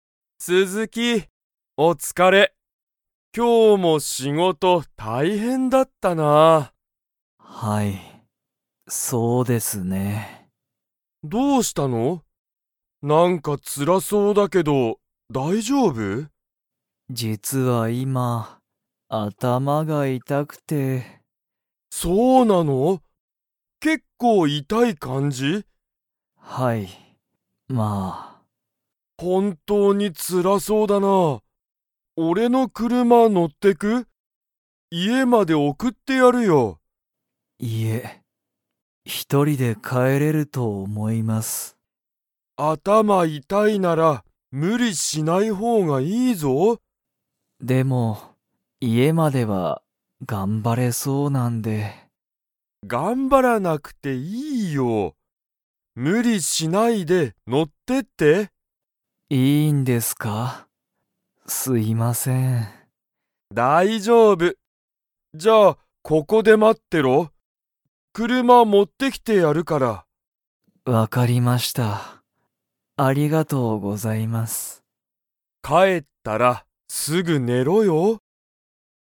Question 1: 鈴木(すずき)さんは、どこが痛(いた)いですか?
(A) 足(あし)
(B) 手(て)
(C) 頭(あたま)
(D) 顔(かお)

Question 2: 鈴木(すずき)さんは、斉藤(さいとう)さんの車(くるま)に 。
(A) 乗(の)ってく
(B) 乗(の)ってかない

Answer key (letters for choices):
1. C
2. A

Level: Level 3